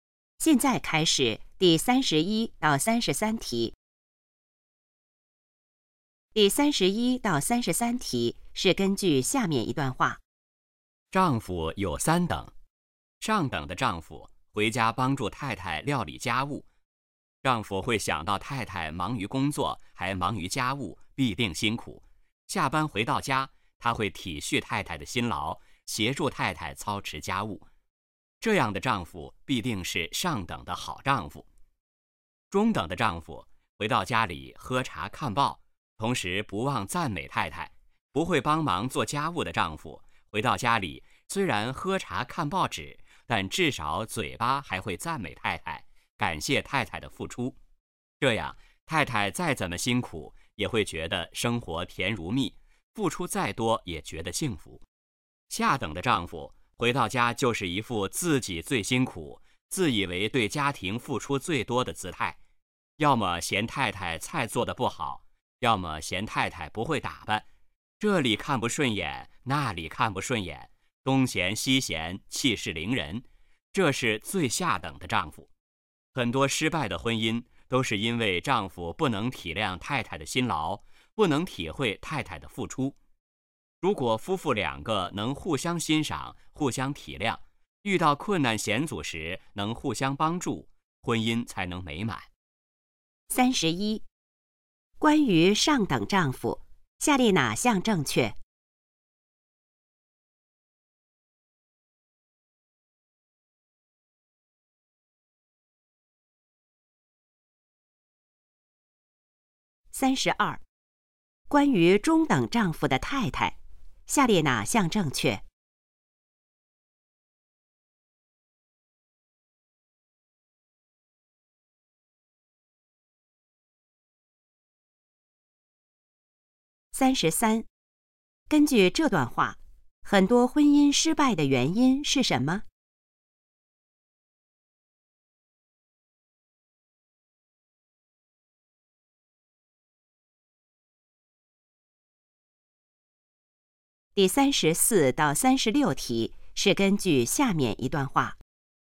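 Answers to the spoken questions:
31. 回家帮助太太料理家务
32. 再辛苦也觉得生活甜蜜幸福
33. 丈夫不能体谅太太的辛劳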